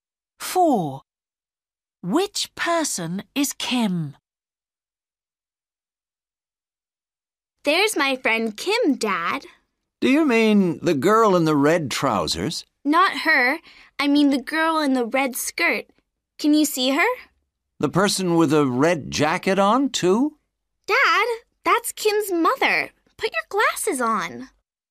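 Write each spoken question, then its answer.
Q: Which person is Kim?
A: the girl in the red skirt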